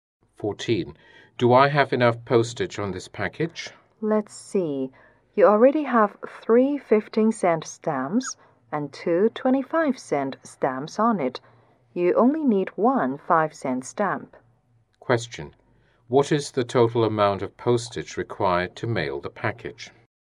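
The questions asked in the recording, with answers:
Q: What is the total amount of postage required to mail the package?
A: One dollar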